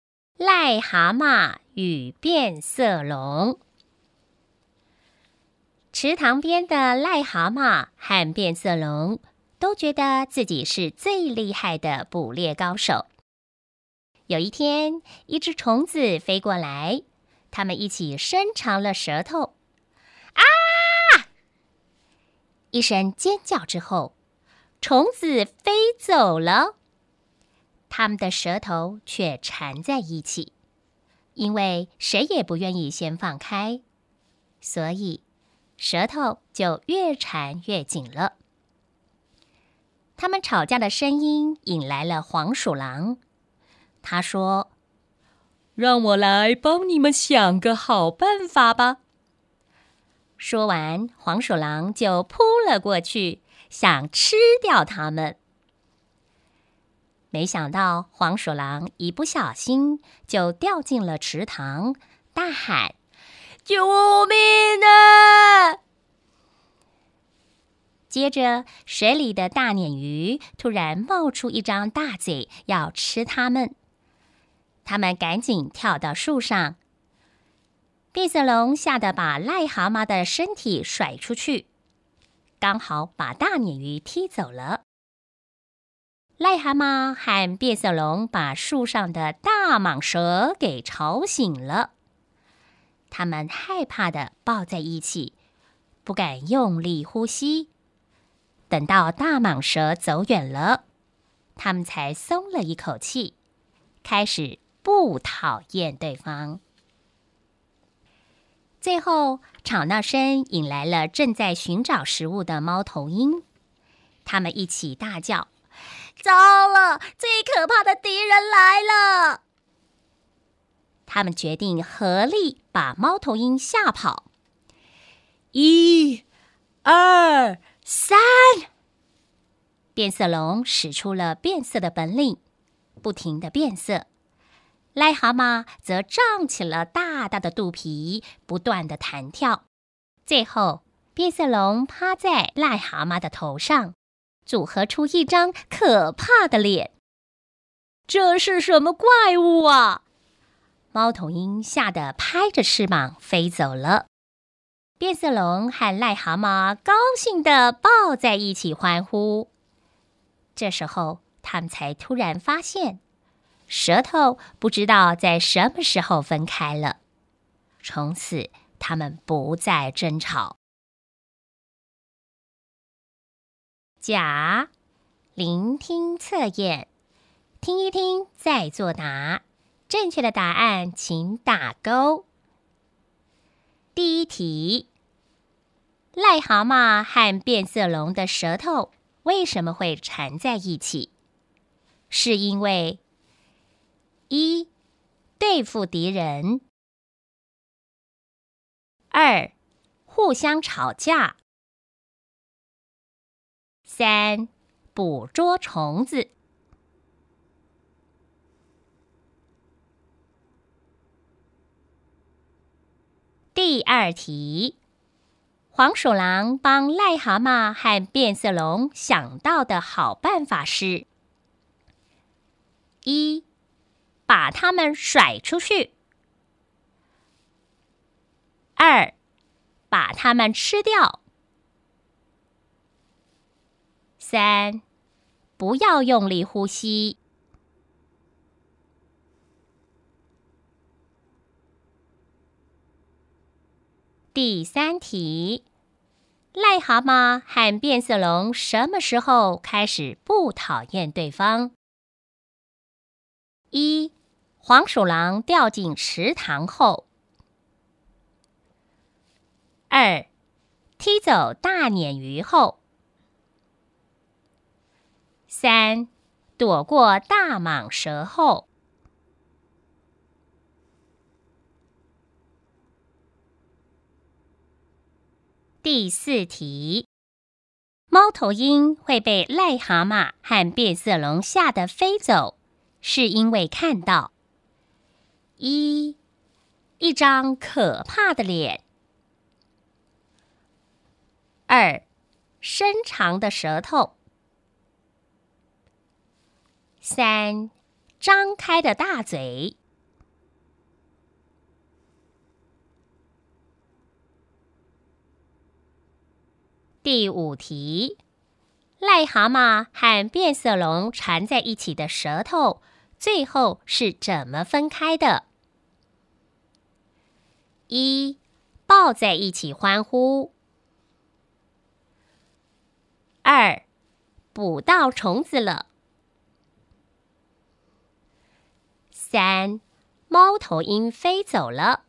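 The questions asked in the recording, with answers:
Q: 癞蛤蟆和变色龙的舌头为什么会缠在一起?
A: 三: 捕捉虫子

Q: 黄鼠狼帮癞蛤蟆和变色龙想到的好办法是:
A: 二: 把它们吃掉

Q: 癞蛤蟆和变色龙什么时候开始不讨厌对方?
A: 三: 躲过大蟒蛇后

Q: 猫头鹰会被癞蛤蟆和变色龙吓得飞走,是因为看到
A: 一: 一张可怕的脸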